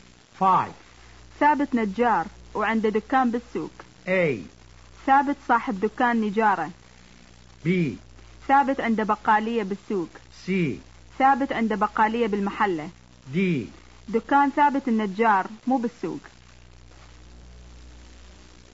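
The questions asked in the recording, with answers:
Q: ثابت نجار وعنده دكان بالسوق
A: A: ثابت صاحب دكان نجارة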